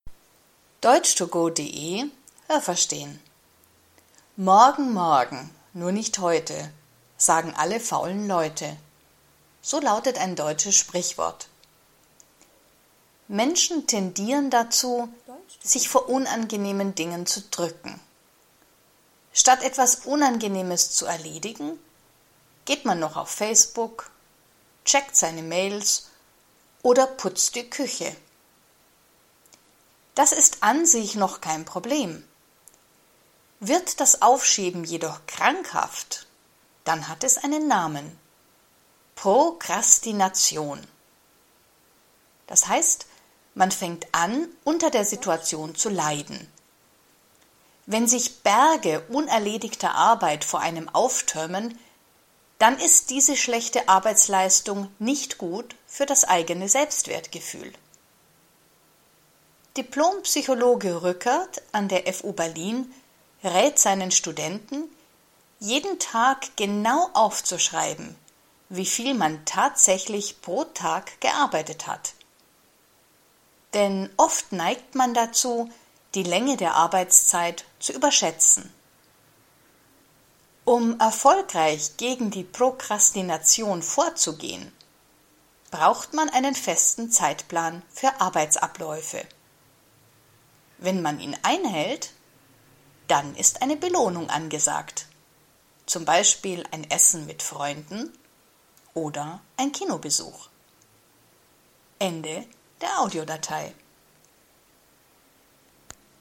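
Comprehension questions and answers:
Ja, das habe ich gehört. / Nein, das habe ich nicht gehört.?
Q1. Menschen tendieren dazu, das Erledigen unangenehmer Dinge aufzuschieben.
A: Ja, das habe ich gehört.

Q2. Das Aufschieben von unangenehmen Dingen ist immer krankhaft.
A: Nein, das habe ich nicht gehört.

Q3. Das Aufschieben ist krankhaft, wenn man selbst unter der Situation leidet.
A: Ja, das habe ich gehört.

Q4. Wenn man viele unerledigte Aufgaben vor sich sieht, dann ist das gut für das Selbstwertgefühl.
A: Nein, das habe ich nicht gehört.

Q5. Ein Diplompsychologe meint, Studenten glauben oft, dass sie länger arbeiten, als sie es in Wirklichkeit tun.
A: Ja, das habe ich gehört.

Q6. Um die Prokrastination zu bekämpfen, muss man mit Freunden essen gehen.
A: Nein, das habe ich nicht gehört.

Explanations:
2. Das ist menschlich und normalerweise kein Problem.
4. Das ist nicht gut für das Selbstwertgefühl.
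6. Man braucht einen festen Zeitplan für Arbeitsabläufe.

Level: B2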